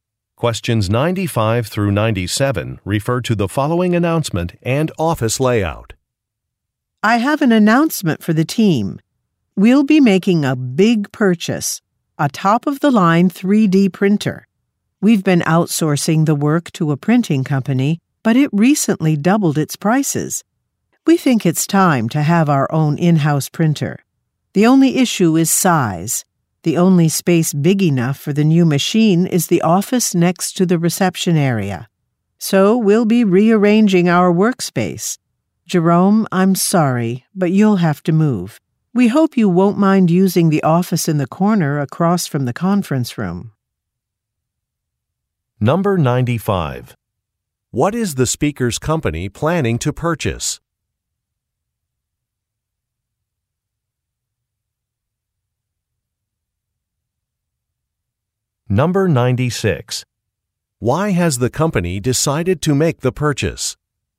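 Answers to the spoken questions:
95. A 3D printer
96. The printing company it outsourced to doubled its prices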